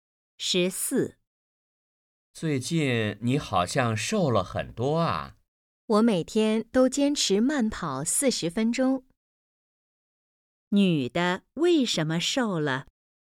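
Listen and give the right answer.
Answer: 每天坚持慢跑40分钟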